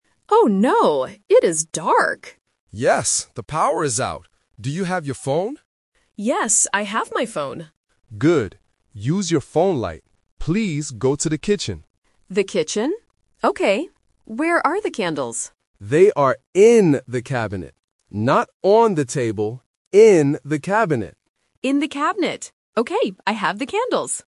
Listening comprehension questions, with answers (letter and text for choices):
Listen to the conversation and choose the correct answer (A, B, or C).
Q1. What does the girl use to see in the dark?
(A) A lamp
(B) A TV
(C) Her phone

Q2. Which room does she go to?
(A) The kitchen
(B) The living room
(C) The bedroom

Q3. Where are the candles?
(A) On the table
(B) In the cabinet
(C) Under the bed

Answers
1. (C) Her phone
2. (A) The kitchen
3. (B) In the cabinet

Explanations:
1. The dad explicitly says, "Use your phone light." Options (A) and (B) are plausible items in a house that produce light, but they need electricity, and more importantly, they are never mentioned in the audio.
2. The dad instructs, "Please go to the kitchen," and the daughter repeats it to confirm. Options (B) and (C) are plausible rooms in a house but are not mentioned.
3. The dad says, "They are in the cabinet" . Option (A) "On the table" is the trap because it is mentioned, but the dad uses negation ("Not on the table"). Option (C) is a plausible hiding place but is absent from the text.

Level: A1